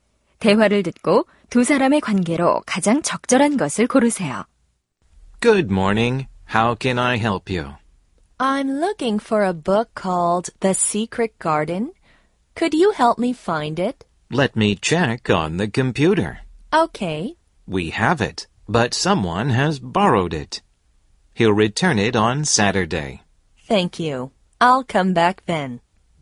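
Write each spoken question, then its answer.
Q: 대화를 듣고 두 사람의 관계로 가장 적절한 것을 고르세요.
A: 도서관 사서와 이용객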